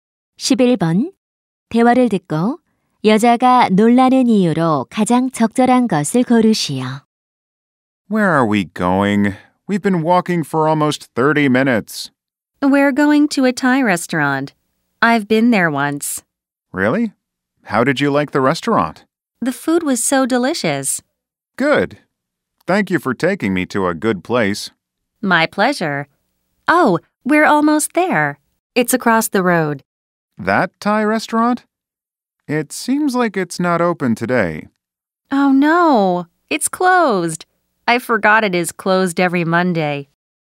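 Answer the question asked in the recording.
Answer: 식당이 문을 닫아서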